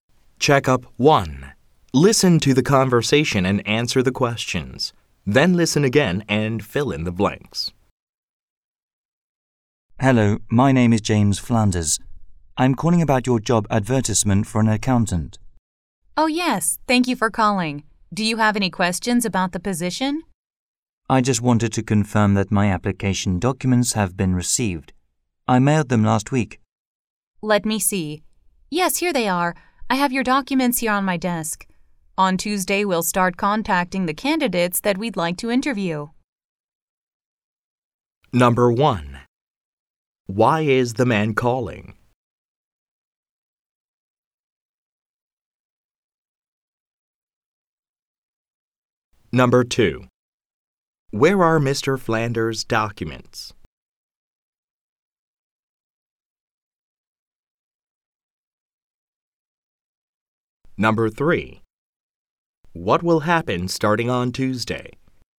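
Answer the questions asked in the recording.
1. To confirm that his application documents for the accountant job have been received
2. On the woman's desk
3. They will start contacting the candidates they want to interview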